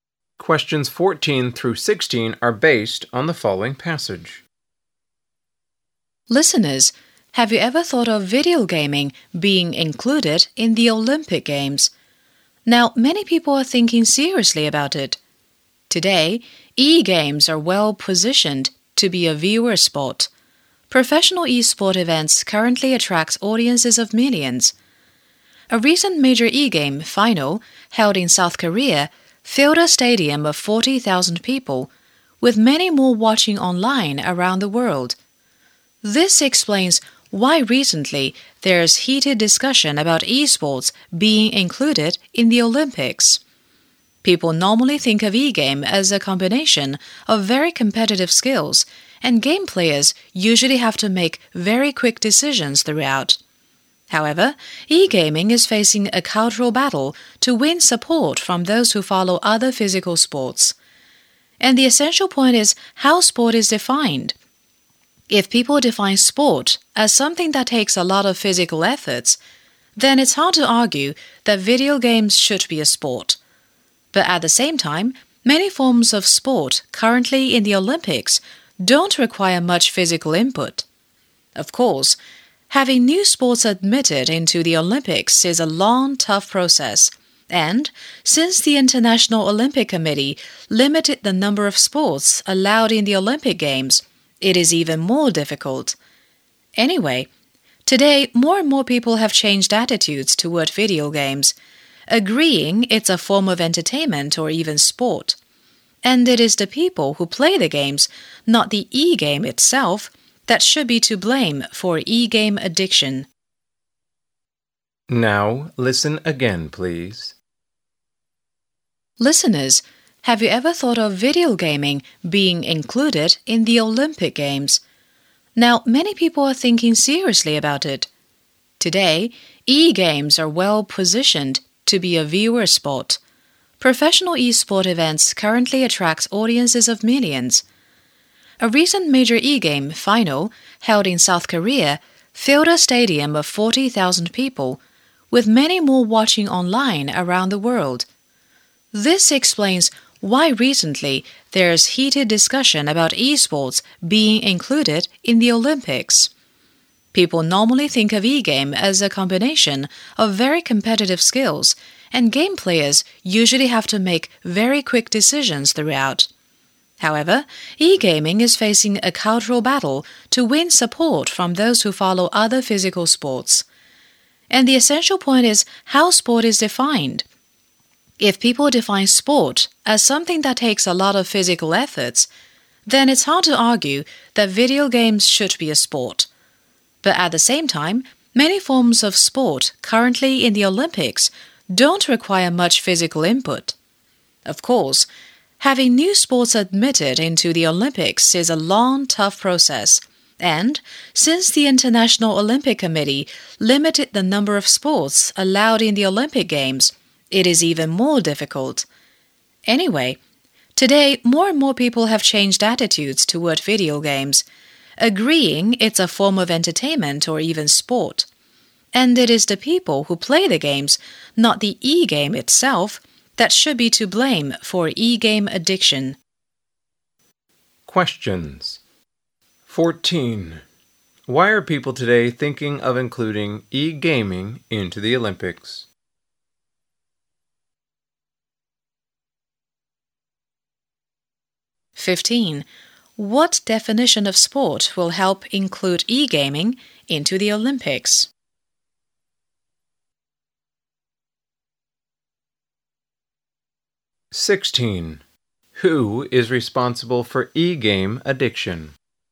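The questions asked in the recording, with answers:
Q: Why are people today thinking of including e-gaming into the Olympics?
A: E-sport events attract huge audiences

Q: What definition of sport will help include e-gaming into the Olympics?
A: One that doesn't require much physical effort

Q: Who is responsible for e-game addiction?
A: The people who play the games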